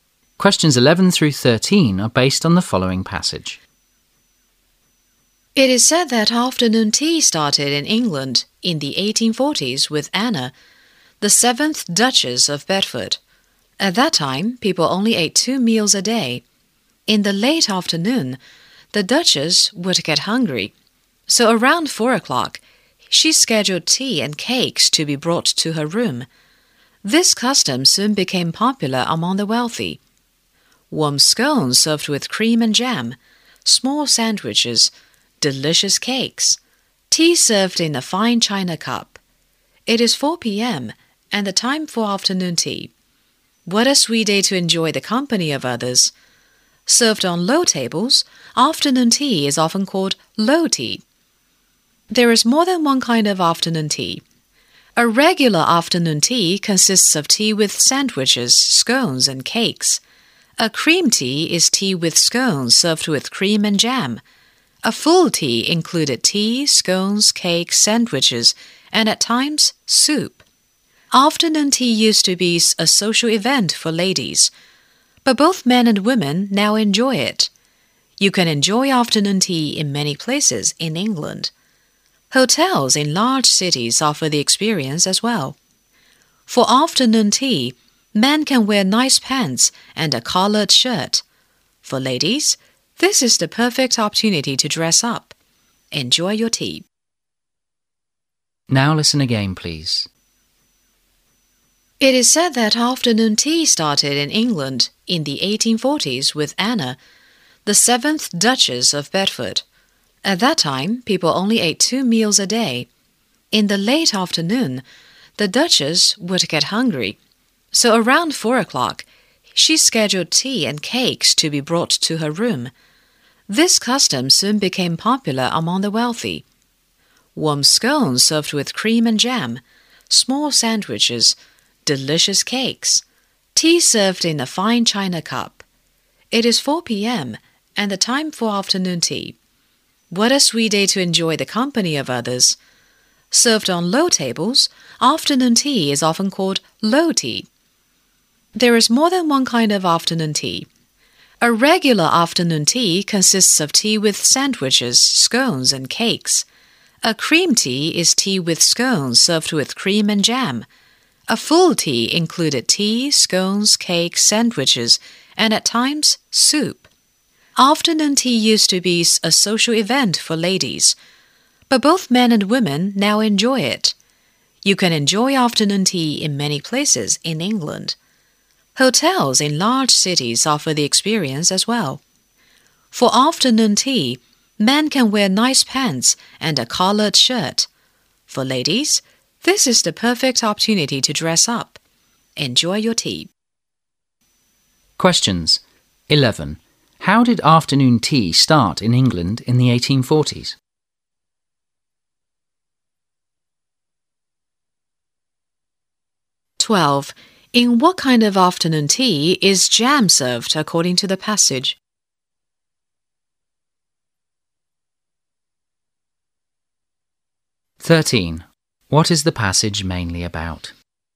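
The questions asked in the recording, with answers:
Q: How did afternoon tea start in England in the 1840s?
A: The Duchess of Bedford got hungry in the late afternoon and had tea and cakes brought to her room

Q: In what kind of afternoon tea is jam served according to the passage?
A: Cream tea

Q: What is the passage mainly about?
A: Afternoon tea in England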